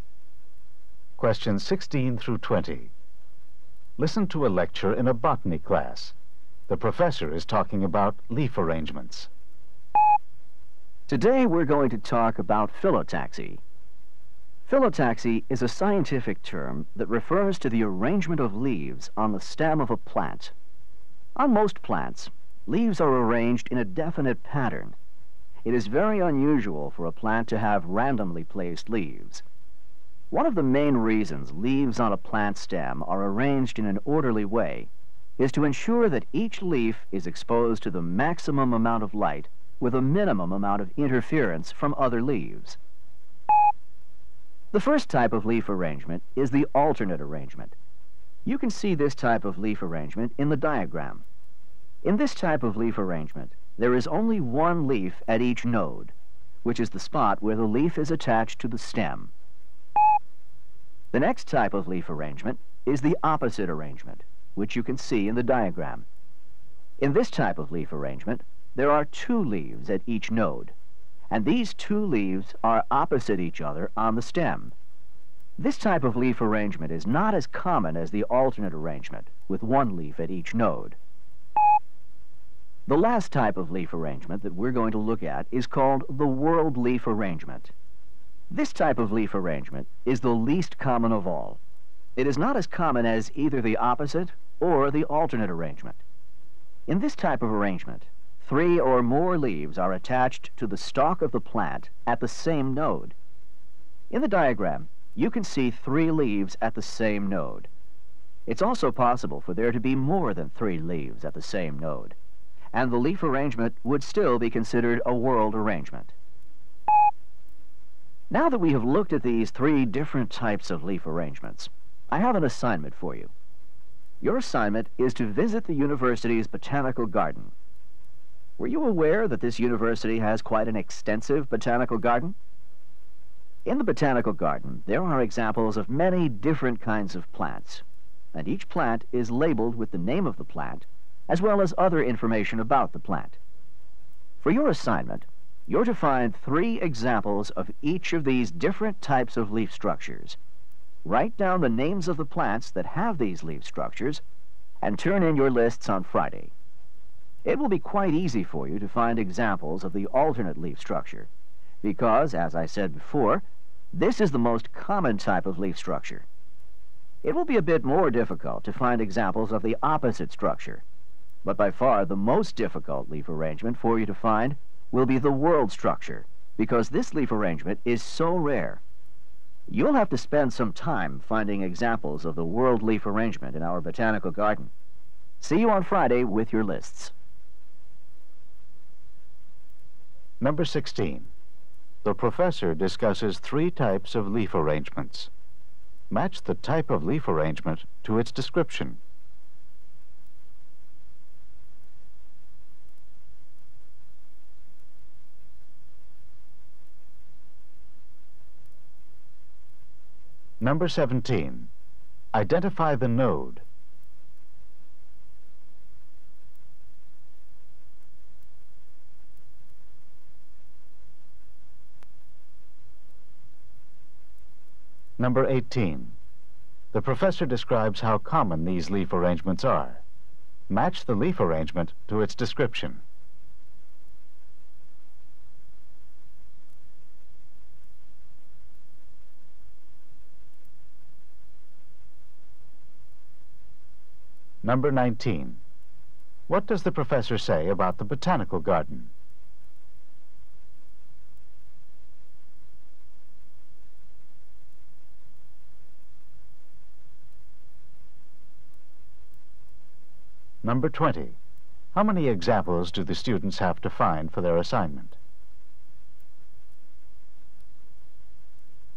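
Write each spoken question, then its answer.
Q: What does the professor say about the botanical garden?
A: The university has an extensive one, with each plant labeled

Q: How many examples do the students have to find for their assignment?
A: Three of each type (nine)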